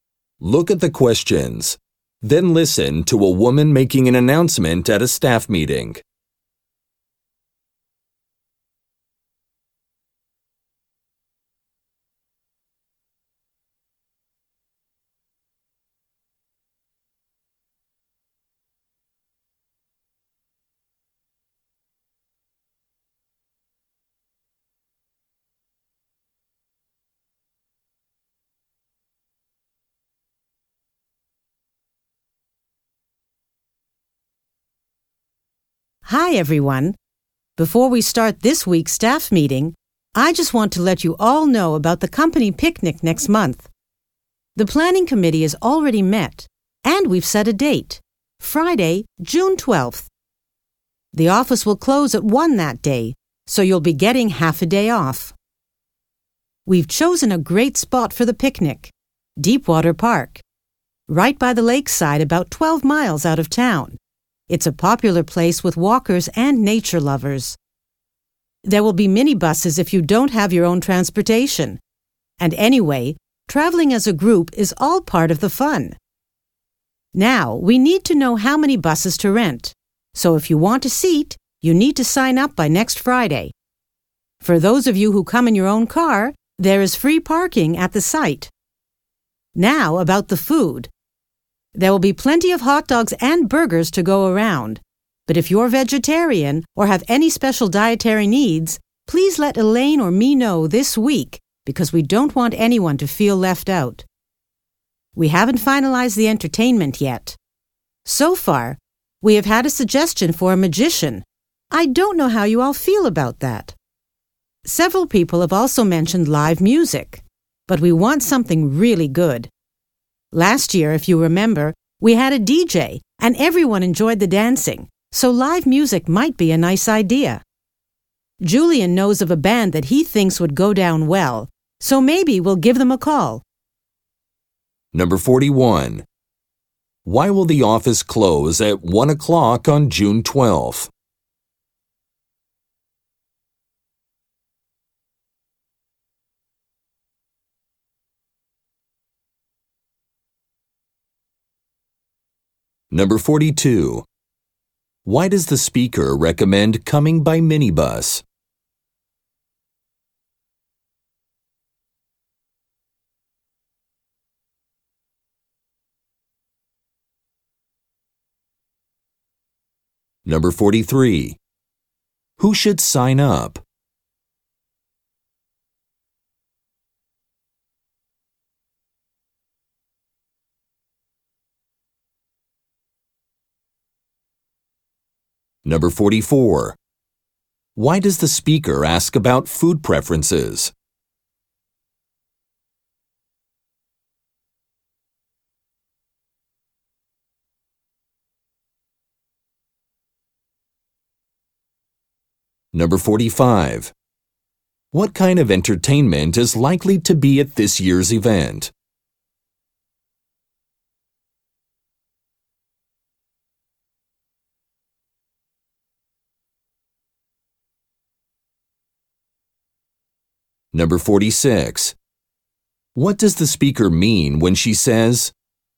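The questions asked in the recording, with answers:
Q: Why will the office close at 1 o'clock on June 12th?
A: Because of the company picnic

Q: Why does the speaker recommend coming by minibus?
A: Traveling as a group is part of the fun

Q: Who should sign up?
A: People who want a seat on the minibus

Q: Why does the speaker ask about food preferences?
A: So nobody with special dietary needs feels left out

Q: What kind of entertainment is likely to be at this year's event?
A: Live music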